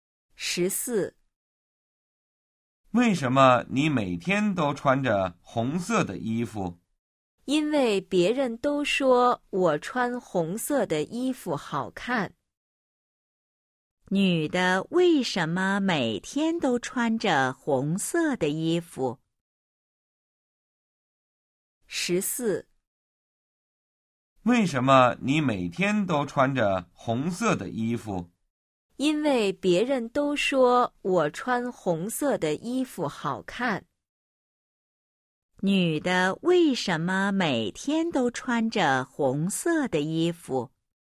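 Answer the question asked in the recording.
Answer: 因为别人都说她穿红色的衣服好看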